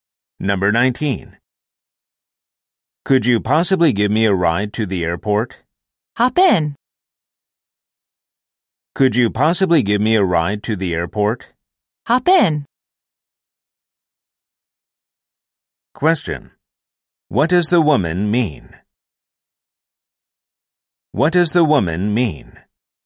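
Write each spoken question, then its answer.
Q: What does the woman mean?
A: She will give him a ride.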